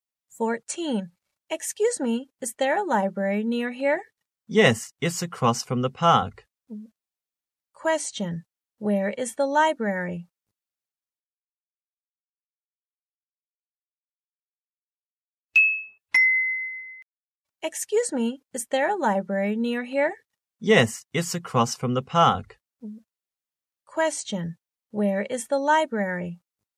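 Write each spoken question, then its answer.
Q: Where is the library?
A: Across from the park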